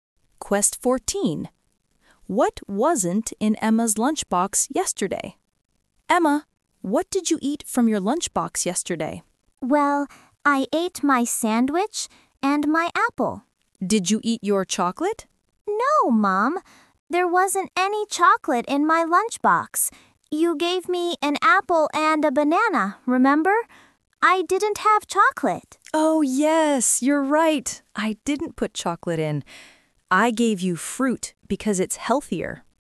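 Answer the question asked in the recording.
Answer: Chocolate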